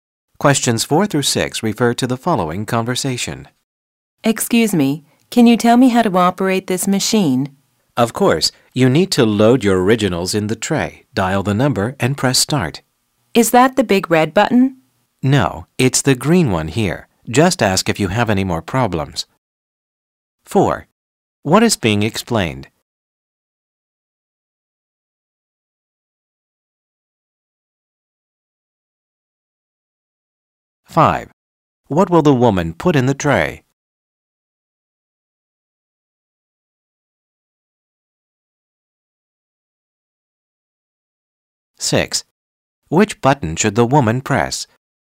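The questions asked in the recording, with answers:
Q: What is being explained?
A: How to operate a fax machine

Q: What will the woman put in the tray?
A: Her originals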